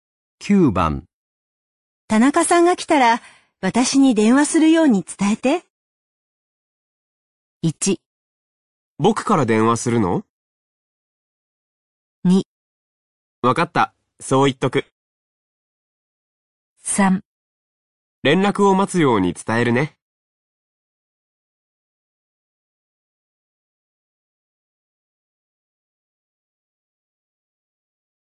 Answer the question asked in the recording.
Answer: 2

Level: N3 Listening · Test 12